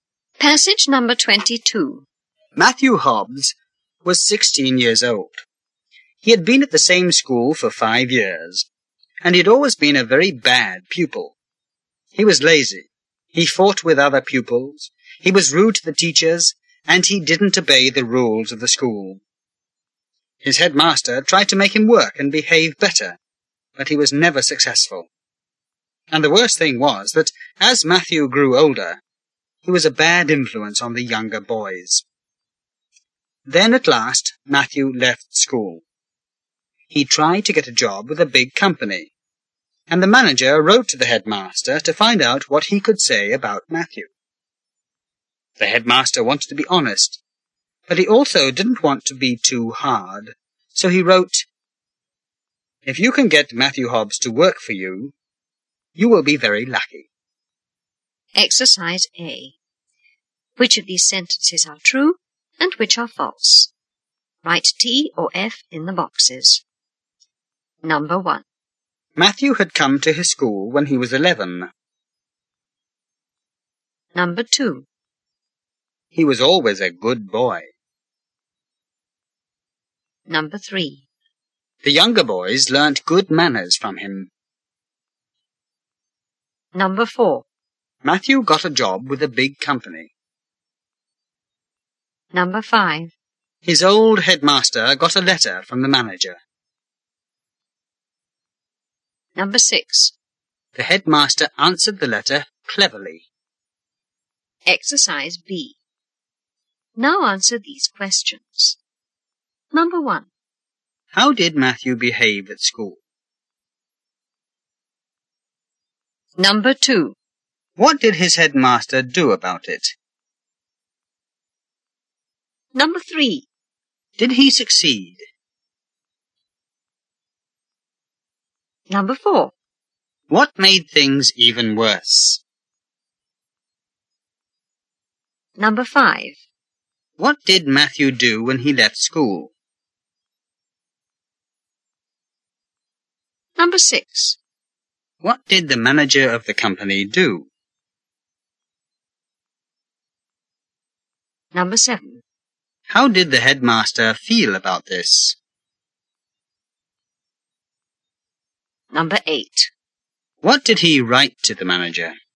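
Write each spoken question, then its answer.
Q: Matthew had come to his school when he was 11.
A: True

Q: He was always a good boy.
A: False

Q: The younger boys learnt good manners from him.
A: False

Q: His old headmaster got a letter from the manager.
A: True

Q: The headmaster answered the letter cleverly.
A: True

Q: How did Matthew behave at school?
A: Very badly: he was lazy, fought, was rude and broke the rules

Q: What did his headmaster do about it?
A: He tried to make him work and behave better

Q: Did he succeed?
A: No

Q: What made things even worse?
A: As he grew older, he was a bad influence on the younger boys

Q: What did Matthew do when he left school?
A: He tried to get a job with a big company

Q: What did the manager of the company do?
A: He wrote to the headmaster to ask about Matthew

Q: How did the headmaster feel about this?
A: He wanted to be honest but not too hard

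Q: What did he write to the manager?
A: "If you can get Matthew Hobbs to work for you, you will be very lucky."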